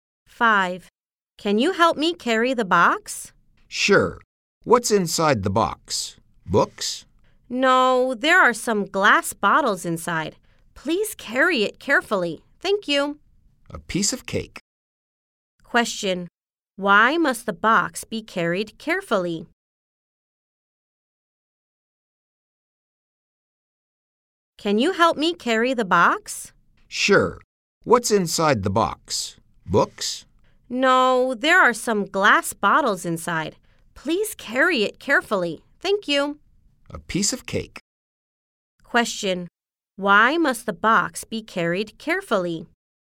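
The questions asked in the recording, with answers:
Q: Why must the box be carried carefully?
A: There are glass bottles inside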